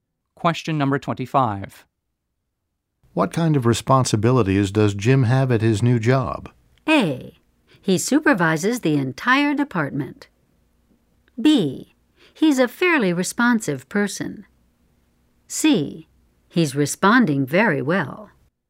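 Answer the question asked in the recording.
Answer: A: He supervises the entire department.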